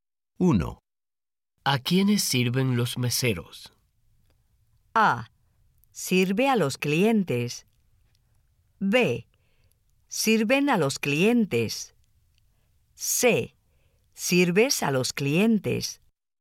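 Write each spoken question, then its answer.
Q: ¿A quiénes sirven los meseros?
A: B: Sirven a los clientes.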